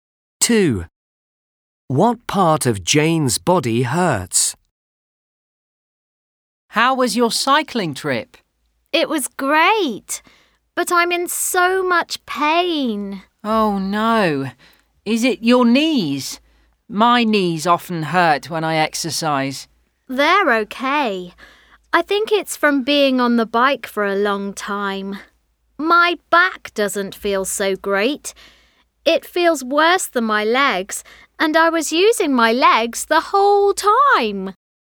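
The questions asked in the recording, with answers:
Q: What part of Jane's body hurts?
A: Her back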